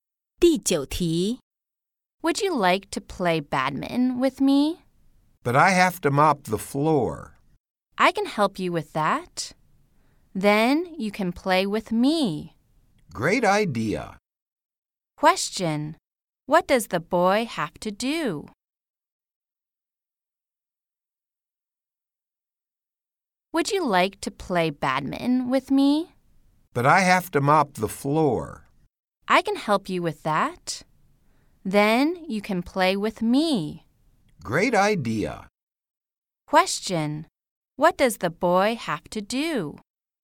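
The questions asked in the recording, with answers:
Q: What does the boy have to do?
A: Mop the floor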